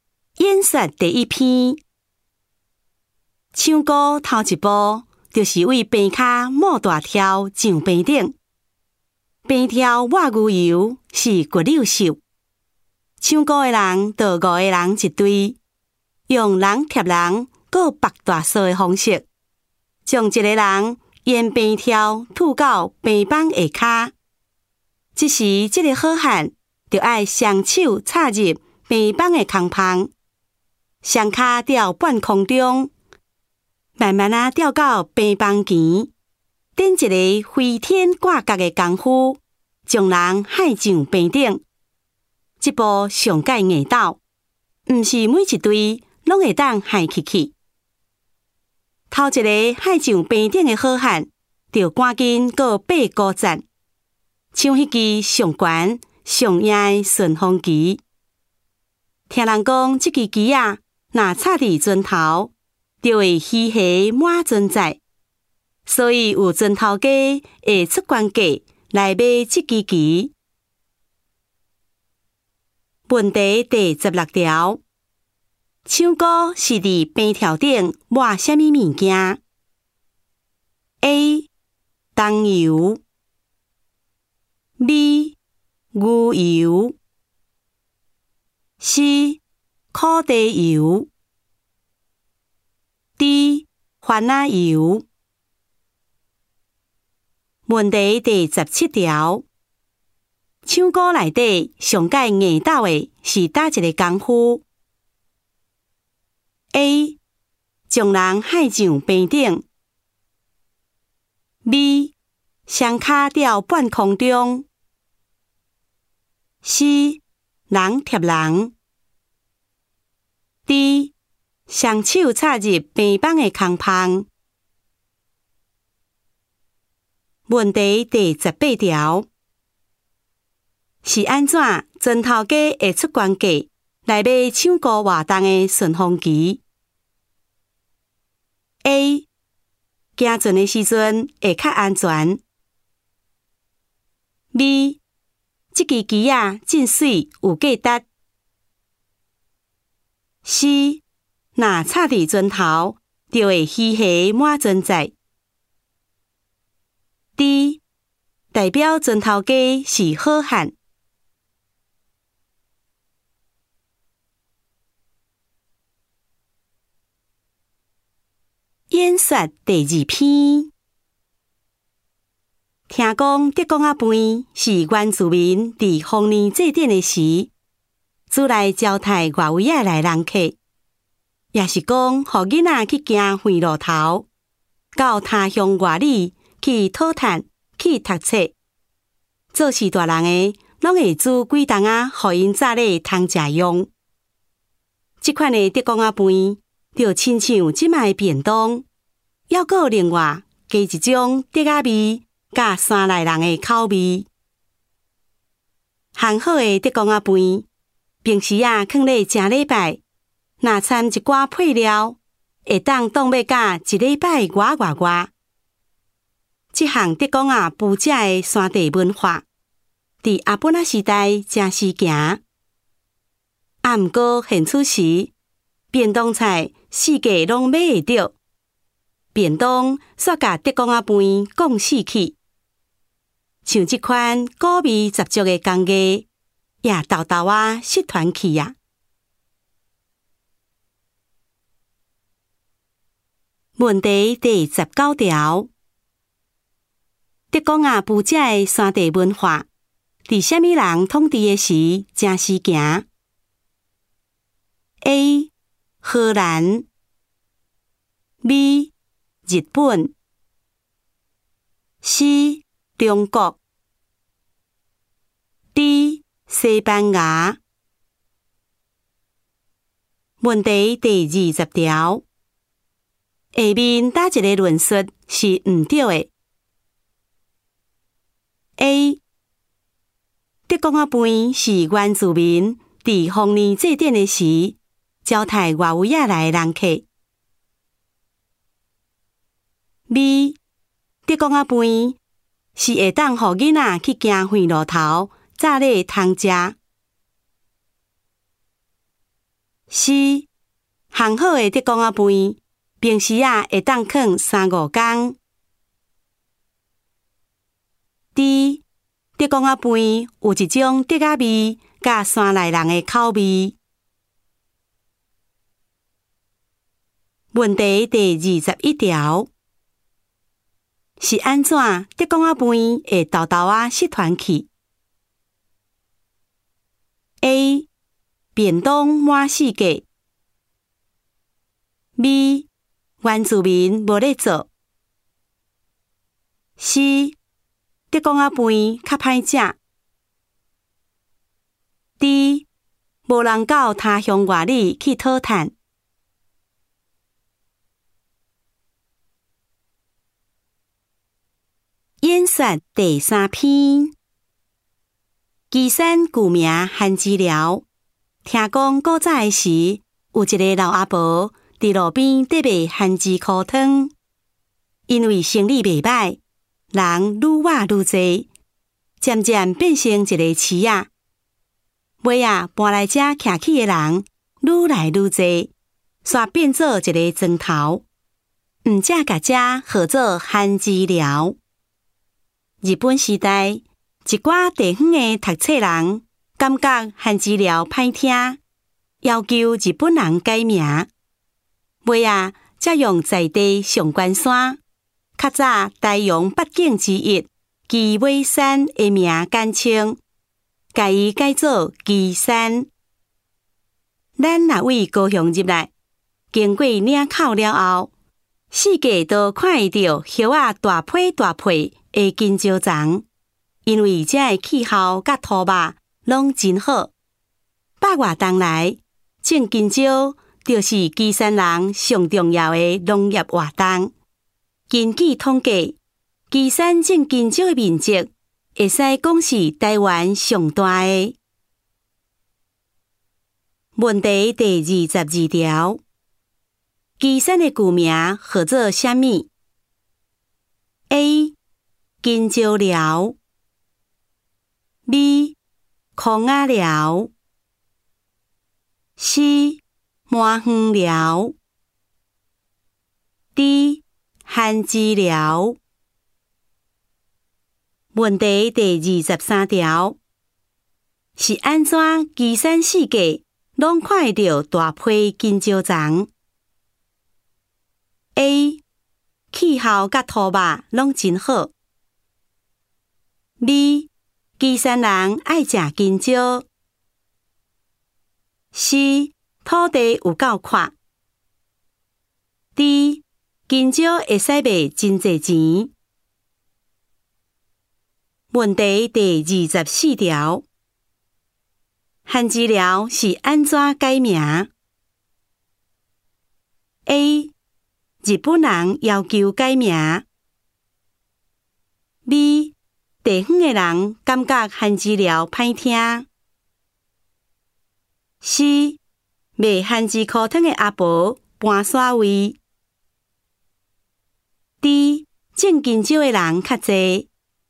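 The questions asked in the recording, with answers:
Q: 唱歌是在边条顶抹什么物件?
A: B: 牛油

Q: 唱歌里面上界硬道的是哪一个功夫?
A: A: 将人害上边顶

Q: 是安怎砖头家会出官价来买唱歌活动的顺风机?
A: C: 若插在船头,就会稀稀满船载

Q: 下面哪一个论述是不对的?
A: C: 行好的德公阿伯平时啊,会当放三五天

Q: 是安怎德公阿伯会偷偷啊失传去 ?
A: A: 便当满四格

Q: 岐山的古名号做什么 ?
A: D: 番薯寮

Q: 是安怎岐山四界拢看得到大批金蕉丛 ?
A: A: 气候甲土吧拢真好

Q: 番薯寮是安怎改名 ?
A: B: 地方的人感觉番薯寮歹听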